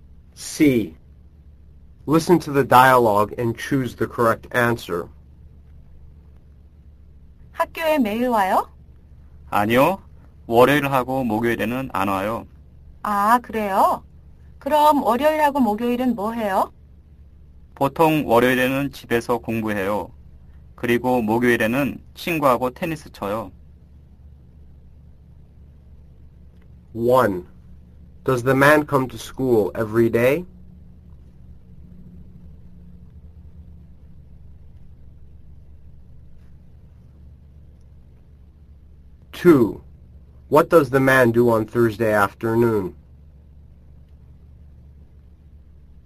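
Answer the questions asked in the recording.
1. No, he doesn't come on Monday and Thursday.
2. He plays tennis with a friend.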